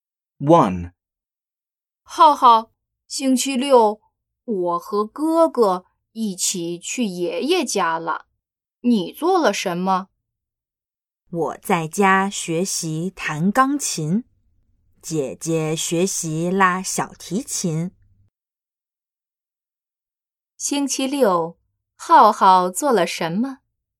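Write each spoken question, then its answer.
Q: 星期六,浩浩做了什么?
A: 在家学习弹钢琴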